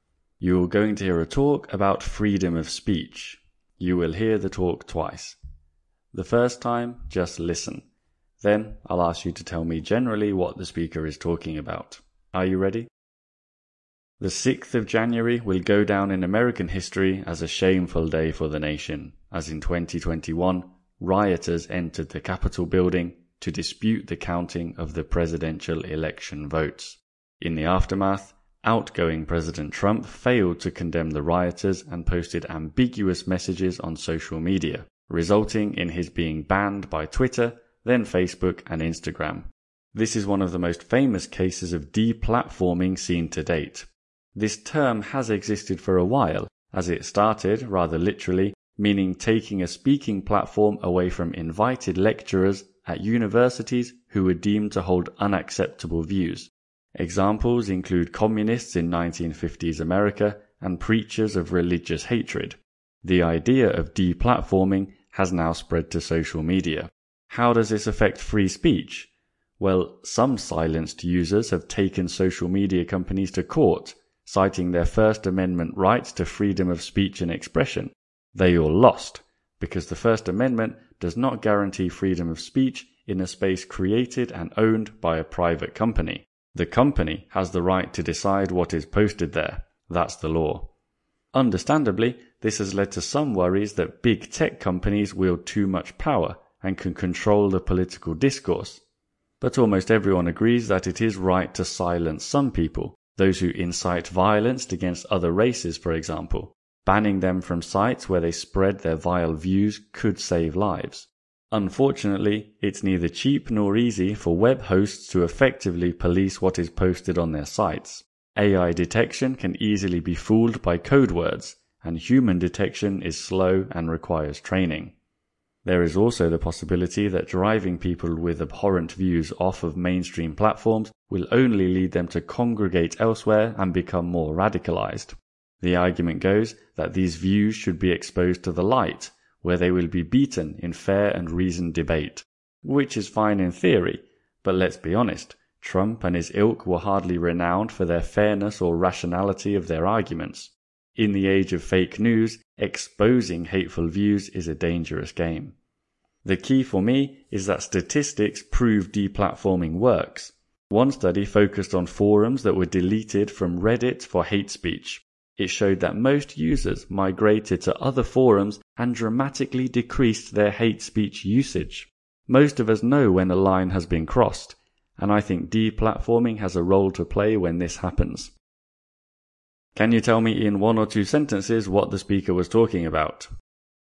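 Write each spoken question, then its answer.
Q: Can you tell me in one or two sentences what the speaker was talking about?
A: Deplatforming: taking away people's platforms, now on social media (e.g. Trump's bans), and its effect on free speech. The speaker argues it works and has a role when a line is crossed.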